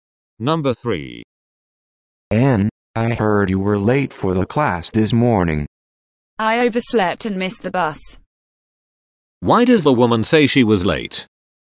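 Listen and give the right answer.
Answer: She overslept and missed the bus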